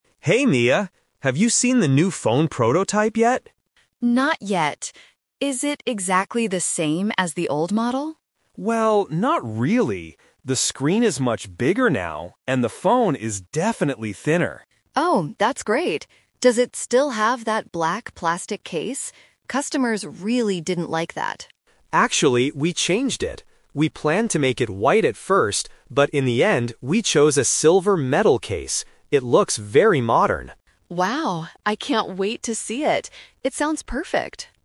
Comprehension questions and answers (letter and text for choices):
Listen to the conversation between two employees and choose the correct answer (A, B, or C).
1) How is the new phone different from the old model?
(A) It has a smaller screen.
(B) It has a bigger screen.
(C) It is much thicker.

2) What was the old phone case made of?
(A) Silver metal.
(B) White plastic.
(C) Black plastic.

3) What color is the NEW phone case?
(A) Black.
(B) White.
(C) Silver.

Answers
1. (B) It has a bigger screen.
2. (C) Black plastic.
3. (C) Silver.

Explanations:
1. Alex clearly says, "The screen is much bigger now." The Trap: Option (A) is the exact opposite of the truth. Option (C) is a trap because the audio mentions the phone's thickness, but Alex says it is "thinner," not thicker.
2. Mia asks, "Does it still have that black plastic case?" and mentions that customers didn't like it. Alex confirms they changed it. The Trap: Option (A) is a trap because it describes the new phone. Option (B) is a trap because "white" is mentioned as a planned color for the new phone.
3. Alex says that in the end, they chose a "silver metal case." The Trap: Option (A) is the color of the old phone. Option (B) "White" is the "Twist" – it was their first plan ("We planned to make it white at first"), but they rejected it.

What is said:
Alex: Hey, Mia. Have you seen the new phone prototype yet?
Mia: Not yet. Is it exactly the same as the old model?
Alex: Well, not really. The screen is much bigger now, and the phone is definitely thinner.
Mia: Oh, that's great! Does it still have that black plastic case? Customers really didn't like that.
Alex: Actually, we changed it. We planned to make it white at first, but in the end, we chose a silver metal case. It looks very modern.